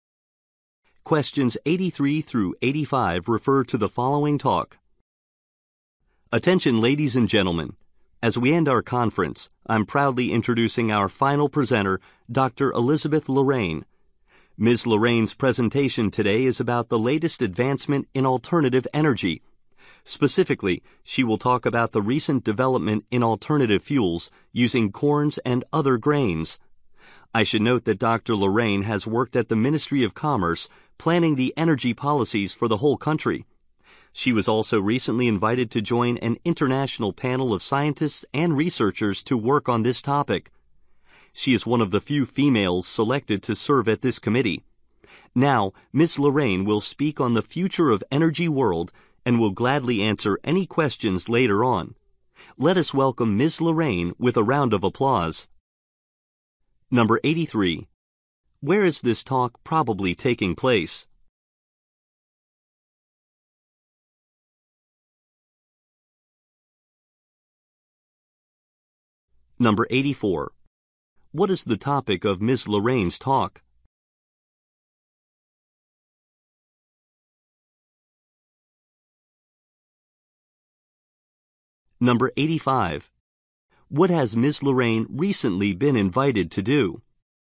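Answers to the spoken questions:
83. At a conference
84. Alternative fuels made from corn and other grains
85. Join an international panel of scientists and researchers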